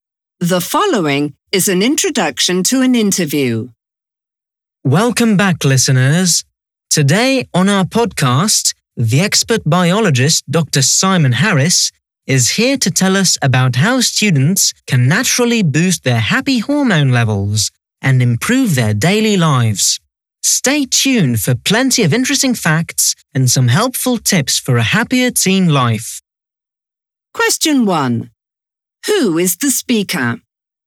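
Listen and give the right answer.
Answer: A podcast host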